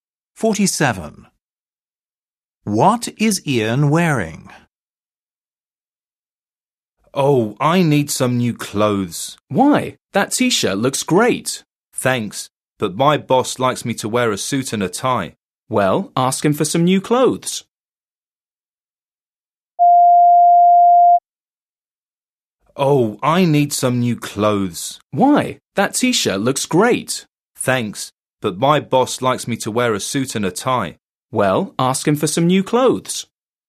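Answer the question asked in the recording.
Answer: a t-shirt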